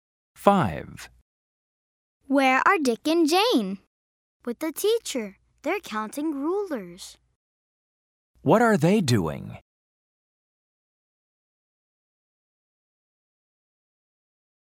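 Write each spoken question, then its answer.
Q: What are they doing?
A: They're counting rulers.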